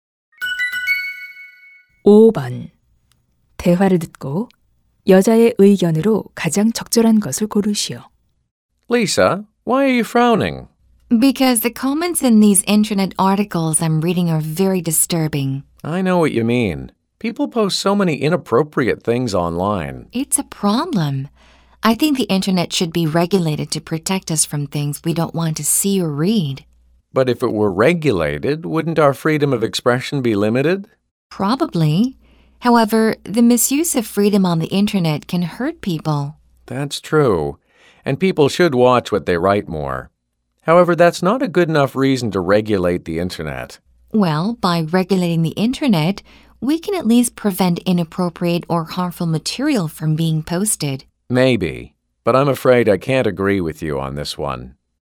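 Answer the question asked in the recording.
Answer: 인터넷은 규제되어야 한다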